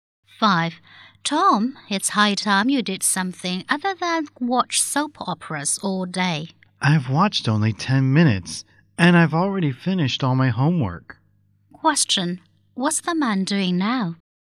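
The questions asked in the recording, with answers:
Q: What's the man doing now?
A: Watching a soap opera on TV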